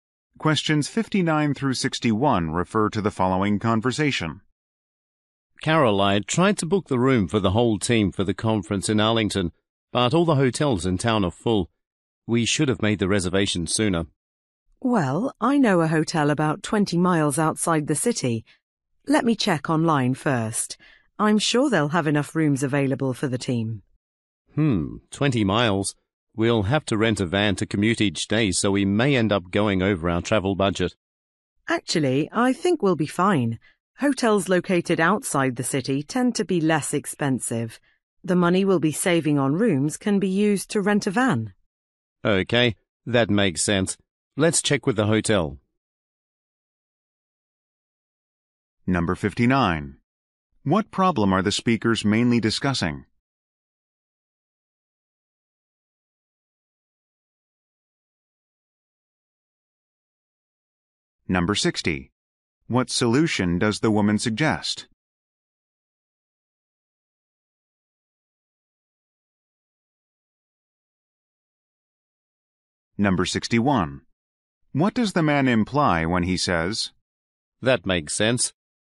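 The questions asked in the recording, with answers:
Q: What problem are the speakers mainly discussing?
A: All the hotels in town are full

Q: What solution does the woman suggest?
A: Stay at a hotel 20 miles outside the city

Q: What does the man imply when he says,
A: He agrees the savings will cover the van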